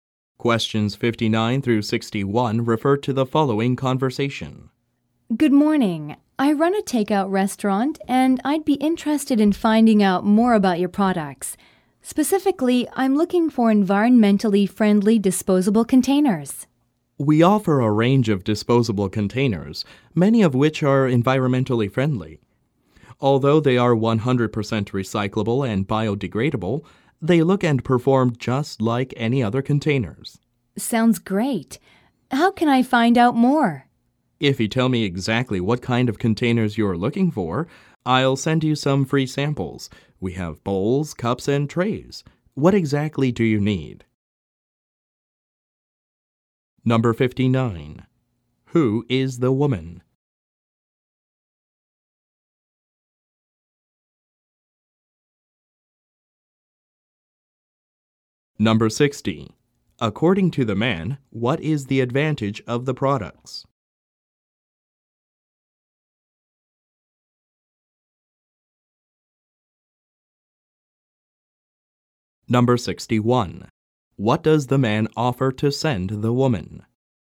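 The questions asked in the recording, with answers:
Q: Who is the woman?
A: A takeout restaurant owner

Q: According to the man, what is the advantage of the products?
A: They are recyclable and biodegradable but look and perform like other containers

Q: What does the man offer to send the woman?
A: Free samples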